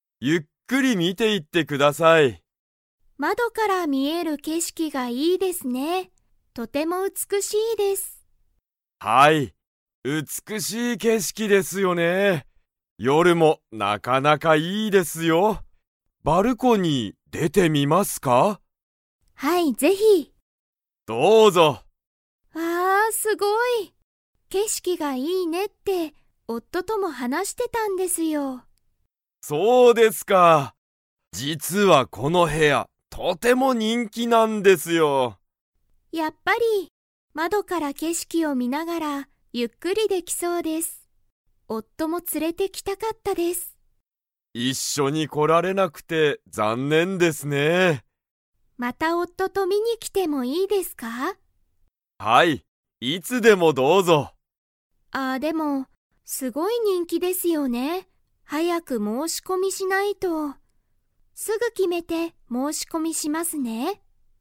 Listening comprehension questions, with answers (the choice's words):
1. ヒロミは、どこから見みえる景色けしきが美うつくしいと言いいましたか?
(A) 屋根やね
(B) 階段かいだん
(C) 玄関げんかん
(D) 窓まど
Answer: 窓まど

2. 夫おっとは一緒いっしょに 。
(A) 来こられた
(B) 来こられなかった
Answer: 来こられなかった

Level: Level 4